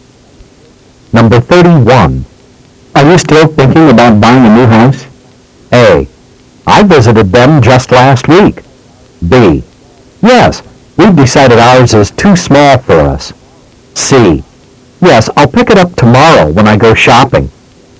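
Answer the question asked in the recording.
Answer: B: Yes, we've decided ours is too small for us.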